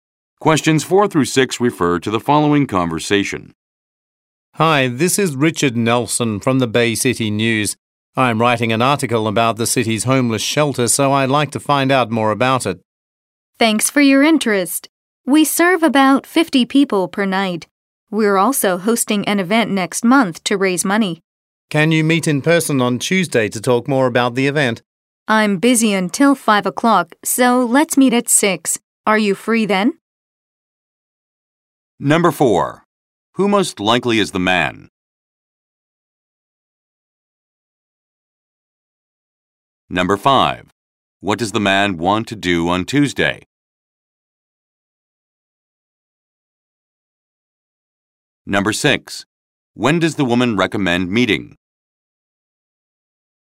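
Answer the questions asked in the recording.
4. A journalist (news reporter)
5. Meet in person to talk more about the event
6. At 6 o'clock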